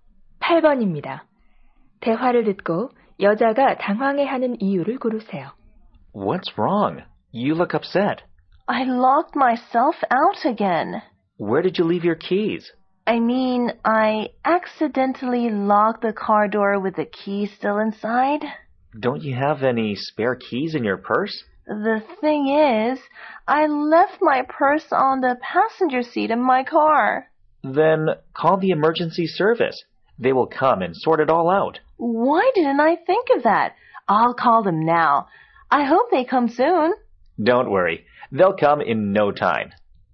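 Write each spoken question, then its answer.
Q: 대화를 듣고 여자가 당황해하는 이유를 고르세요.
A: 열쇠를 차 안에 두고 차 문을 잠가서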